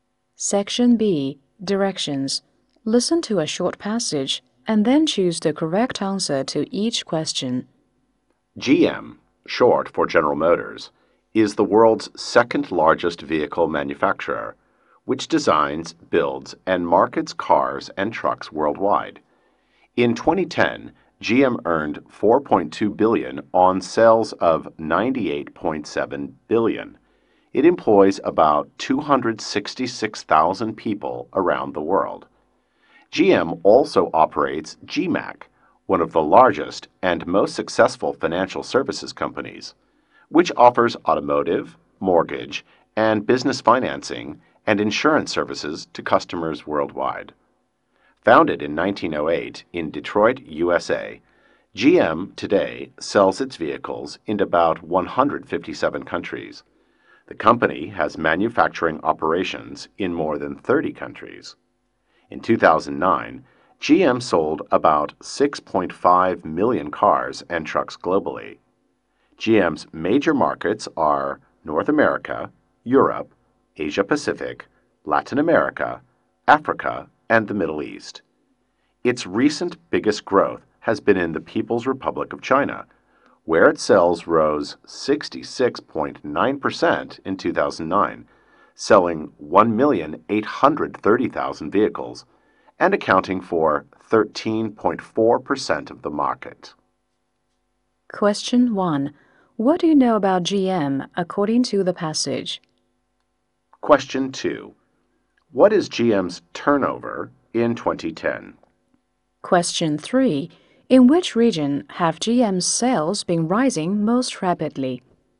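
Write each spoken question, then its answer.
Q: What is GM's turnover in 2010?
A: $98.7 billion

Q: In which region have GM's sales been rising most rapidly?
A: The People's Republic of China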